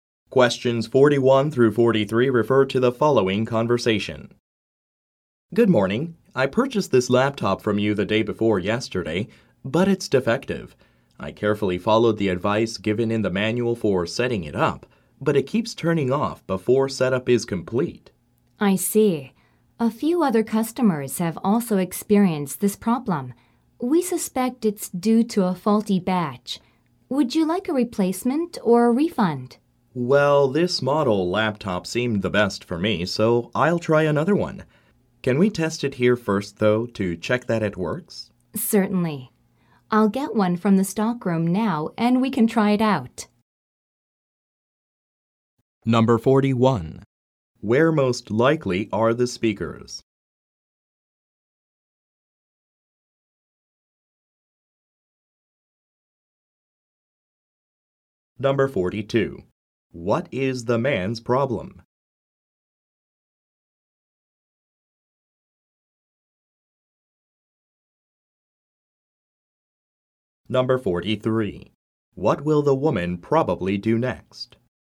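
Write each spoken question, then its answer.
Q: Where most likely are the speakers?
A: In an electronics store

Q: What is the man's problem?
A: His new laptop is defective and keeps turning off during setup

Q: What will the woman probably do next?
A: Get a replacement laptop from the stockroom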